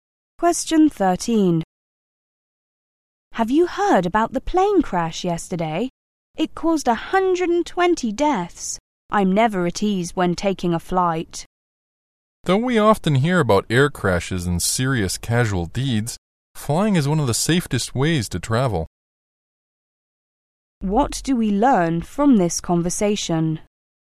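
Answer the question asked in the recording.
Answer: The woman is nervous about flying, but the man says flying is one of the safest ways to travel.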